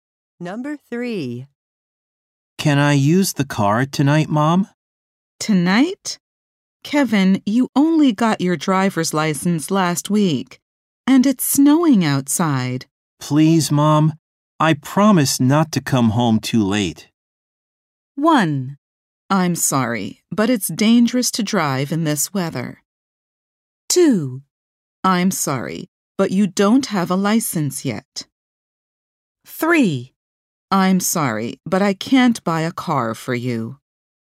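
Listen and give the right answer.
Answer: 1: I'm sorry, but it's dangerous to drive in this weather.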